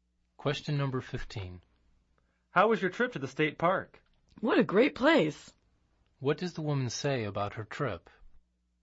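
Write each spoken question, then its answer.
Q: What does the woman say about her trip?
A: The state park was a great place.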